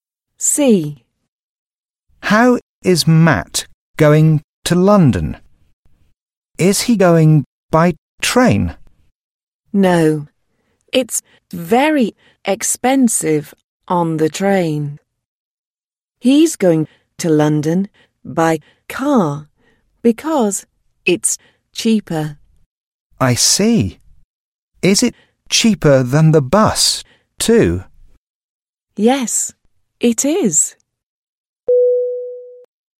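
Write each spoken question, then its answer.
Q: How is Matt going to London?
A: by car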